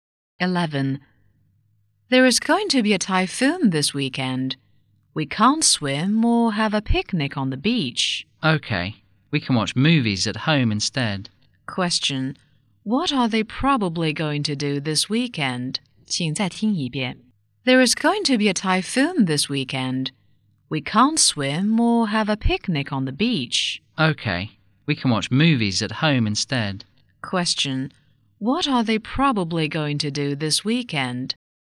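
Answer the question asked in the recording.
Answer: Watch movies at home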